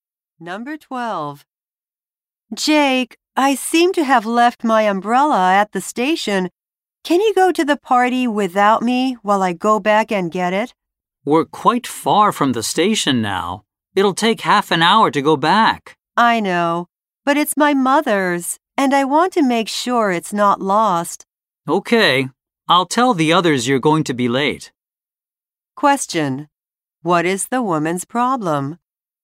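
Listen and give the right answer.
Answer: She left her mother's umbrella at the station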